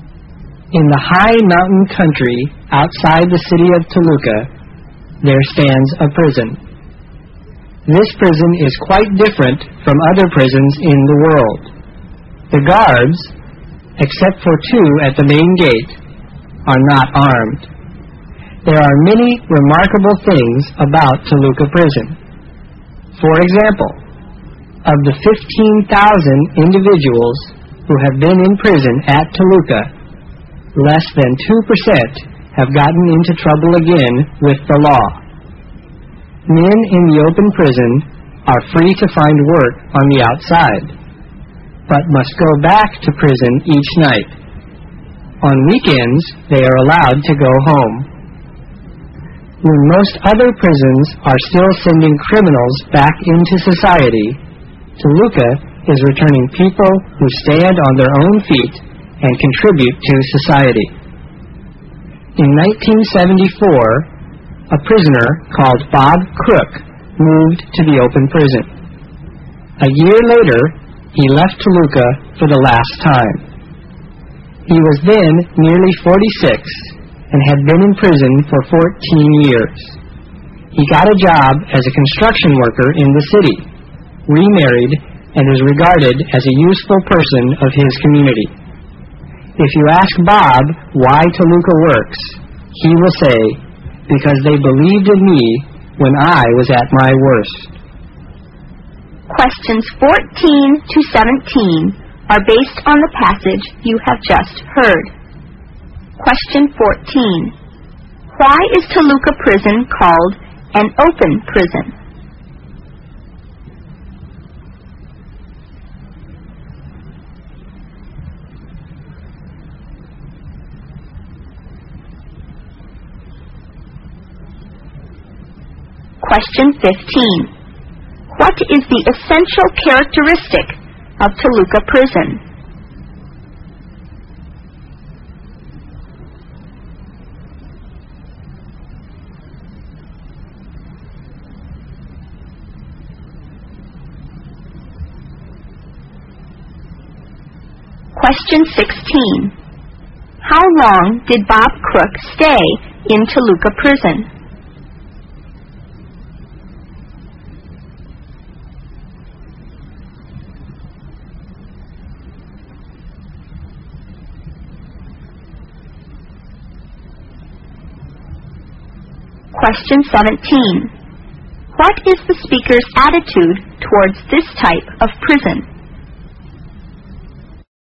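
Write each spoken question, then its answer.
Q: Why is Toluca Prison called an open prison?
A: Prisoners are free to work outside during the day and go home on weekends, returning to prison each night.

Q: What is the speaker's attitude towards this type of prison?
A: Approving; the speaker thinks highly of it.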